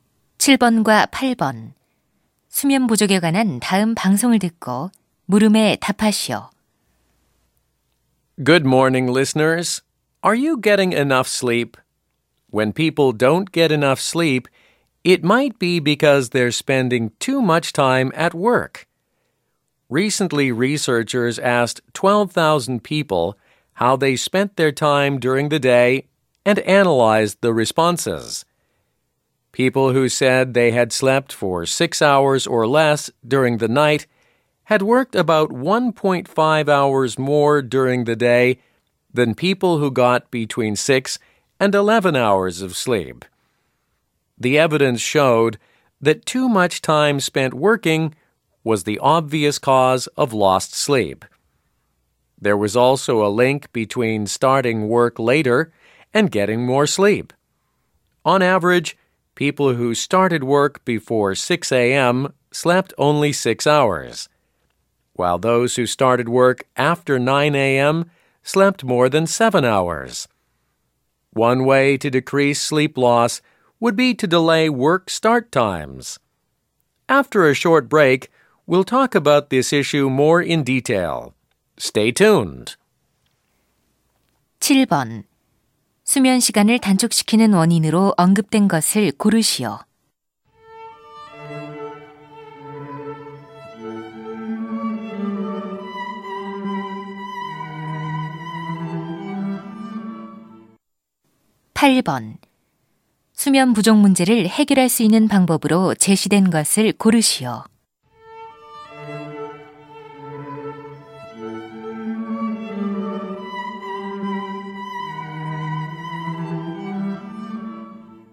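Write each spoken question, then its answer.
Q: 수면 시간을 단축시키는 원인으로 언급된 것을 고르시오.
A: 과도한 근무 시간

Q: 수면 부족 문제를 해결할 수 있는 방법으로 제시된 것을 고르시오.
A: 업무 시작 시간을 늦추기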